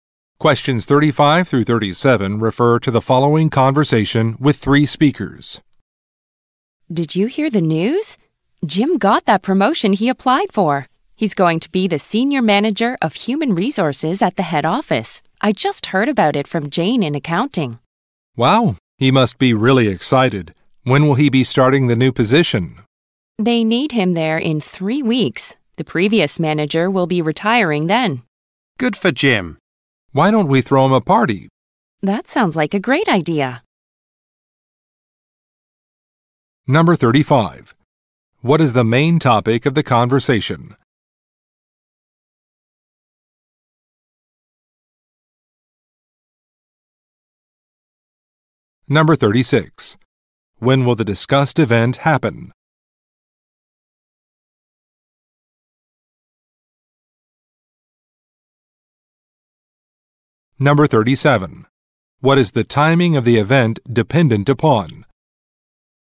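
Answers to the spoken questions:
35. Jim's promotion
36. In 3 weeks
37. The previous manager's retirement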